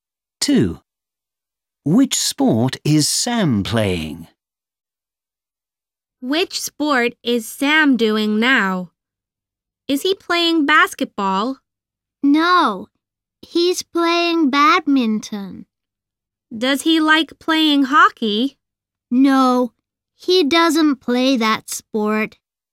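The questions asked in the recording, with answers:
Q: Which sport is Sam playing?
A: badminton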